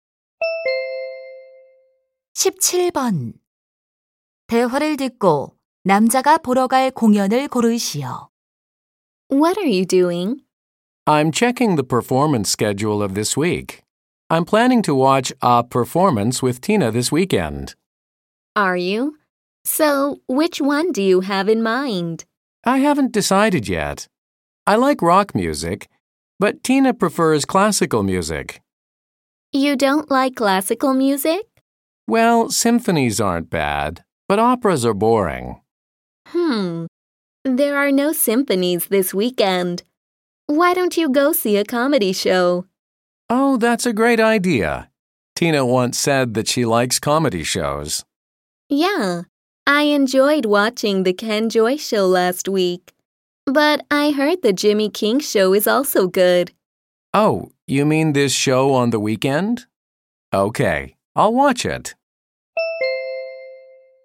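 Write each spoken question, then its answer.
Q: 대화를 듣고 남자가 보러 갈 공연을 고르시오.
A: 주말에 하는 Jimmy King 코미디 쇼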